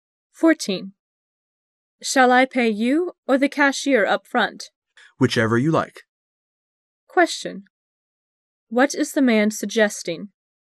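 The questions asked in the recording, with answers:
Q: What is the man suggesting?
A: The woman can pay either him or the cashier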